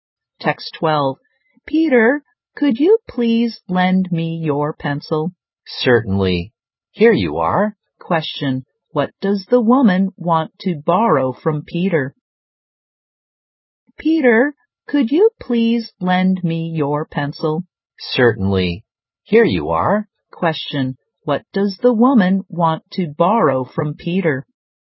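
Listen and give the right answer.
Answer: His pencil.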